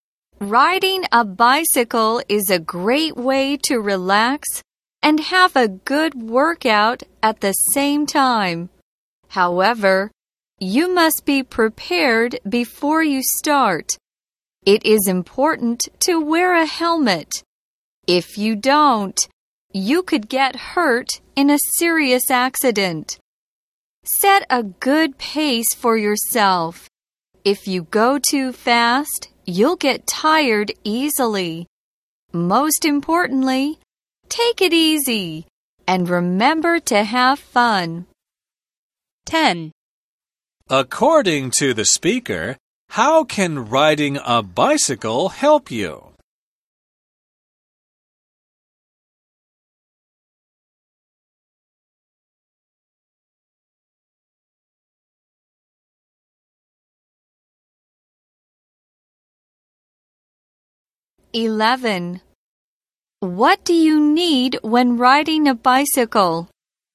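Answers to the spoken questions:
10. It helps you relax and have a good workout.
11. A helmet.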